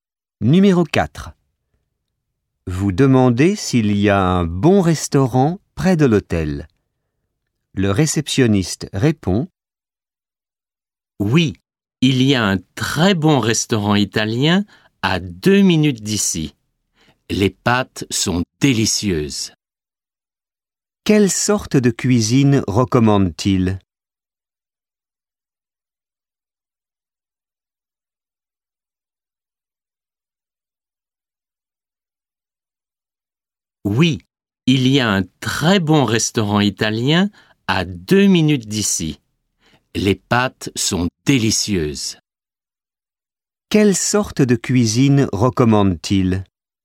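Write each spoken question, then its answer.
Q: Quelle sorte de cuisine recommande-t-il?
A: La cuisine italienne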